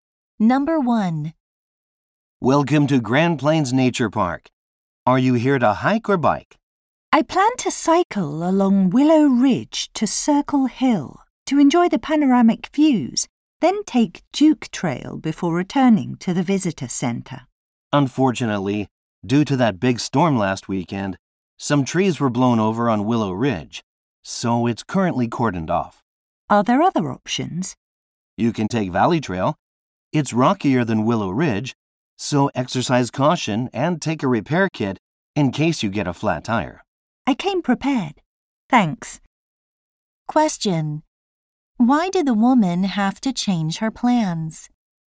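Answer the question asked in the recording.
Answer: Willow Ridge is closed because storm-fallen trees blocked it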